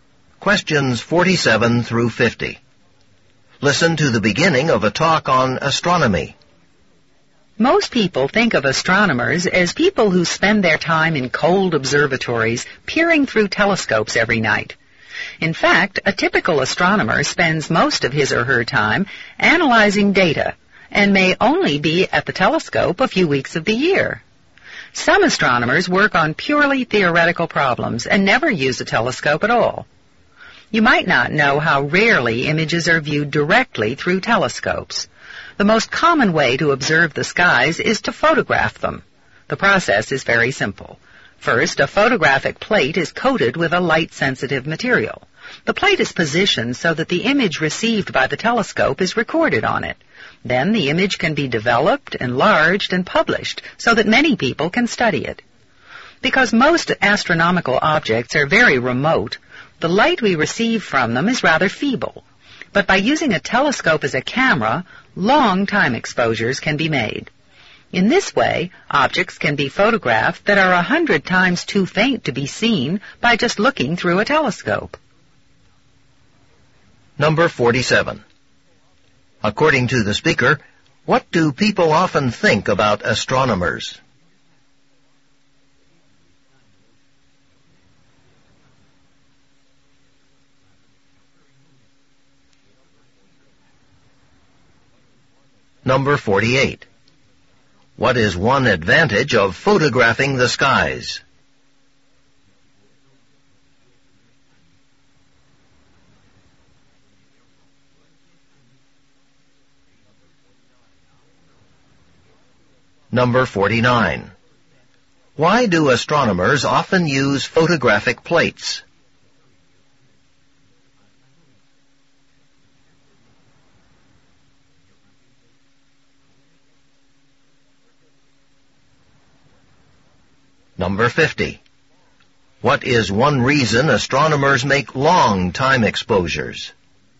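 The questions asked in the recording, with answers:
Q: According to the speaker, what do people often think about astronomers?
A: That they spend every night peering through telescopes in cold observatories

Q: What is one reason astronomers make long time exposures?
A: To photograph objects too faint to see by just looking through a telescope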